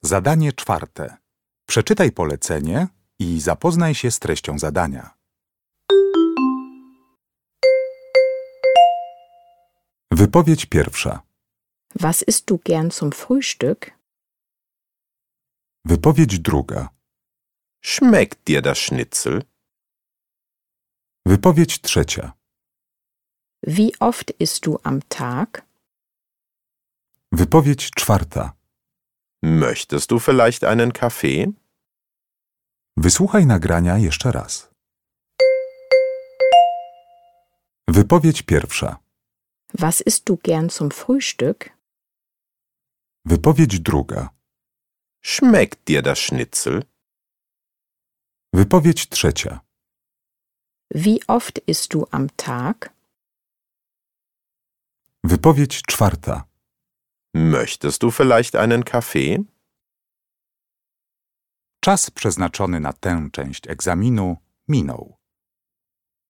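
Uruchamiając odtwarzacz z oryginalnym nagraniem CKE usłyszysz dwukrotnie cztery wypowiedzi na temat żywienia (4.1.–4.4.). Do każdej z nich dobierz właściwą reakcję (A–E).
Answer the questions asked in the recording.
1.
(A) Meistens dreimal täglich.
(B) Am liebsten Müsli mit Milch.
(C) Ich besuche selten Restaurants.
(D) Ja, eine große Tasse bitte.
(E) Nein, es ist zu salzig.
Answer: (B) Am liebsten Müsli mit Milch.
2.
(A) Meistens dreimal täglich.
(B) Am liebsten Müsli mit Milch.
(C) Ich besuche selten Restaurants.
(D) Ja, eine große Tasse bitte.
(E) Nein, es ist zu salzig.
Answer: (E) Nein, es ist zu salzig.
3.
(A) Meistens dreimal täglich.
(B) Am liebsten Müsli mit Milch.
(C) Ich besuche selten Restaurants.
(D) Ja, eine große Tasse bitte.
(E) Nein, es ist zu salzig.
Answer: (A) Meistens dreimal täglich.
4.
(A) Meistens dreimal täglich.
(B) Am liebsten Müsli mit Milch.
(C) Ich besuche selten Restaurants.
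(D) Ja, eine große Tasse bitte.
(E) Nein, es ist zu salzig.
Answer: (D) Ja, eine große Tasse bitte.

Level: egzamin ósmoklasisty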